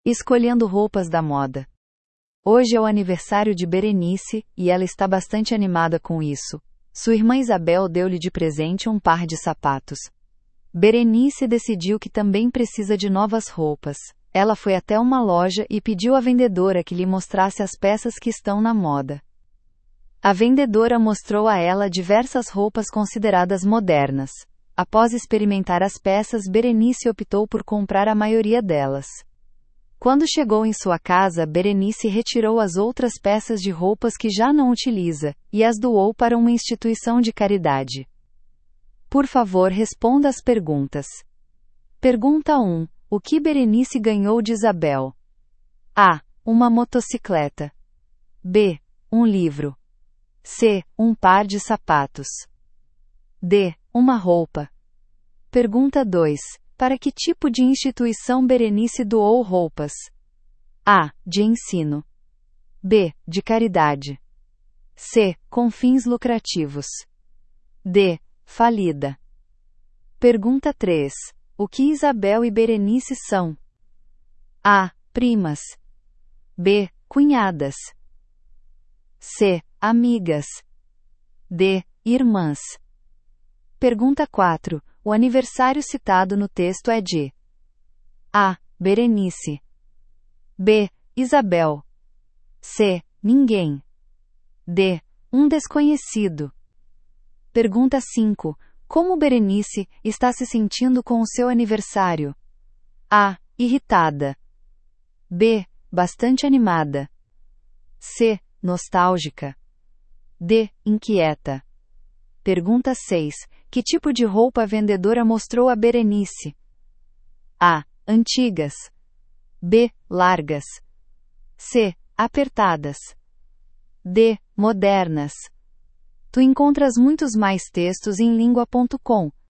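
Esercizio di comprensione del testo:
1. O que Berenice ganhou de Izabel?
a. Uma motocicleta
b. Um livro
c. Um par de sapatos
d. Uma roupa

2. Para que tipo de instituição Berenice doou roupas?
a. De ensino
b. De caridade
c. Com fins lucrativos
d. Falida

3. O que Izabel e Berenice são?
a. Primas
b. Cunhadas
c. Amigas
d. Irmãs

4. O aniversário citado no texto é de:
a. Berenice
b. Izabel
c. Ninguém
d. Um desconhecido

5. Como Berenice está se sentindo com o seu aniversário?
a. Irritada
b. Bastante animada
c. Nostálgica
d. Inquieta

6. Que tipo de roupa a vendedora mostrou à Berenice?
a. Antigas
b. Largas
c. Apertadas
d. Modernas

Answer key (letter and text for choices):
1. c. Um par de sapatos
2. b. De caridade
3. d. Irmãs
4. a. Berenice
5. b. Bastante animada
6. d. Modernas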